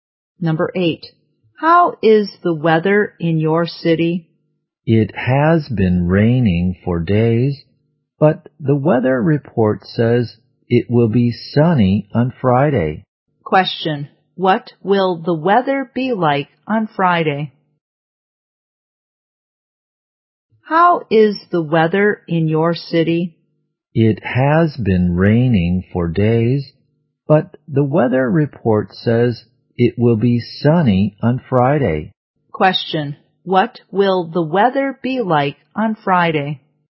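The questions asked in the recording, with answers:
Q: What will the weather be like on Friday?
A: Sunny.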